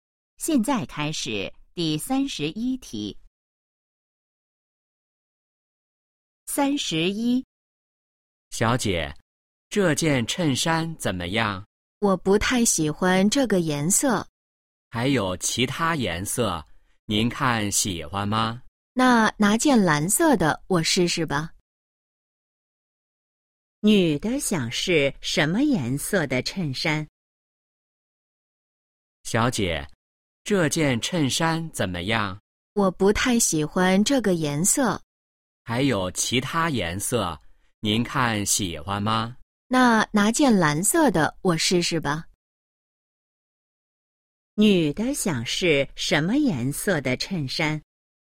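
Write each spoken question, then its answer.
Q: 女的想试什么颜色的衬衫?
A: 蓝色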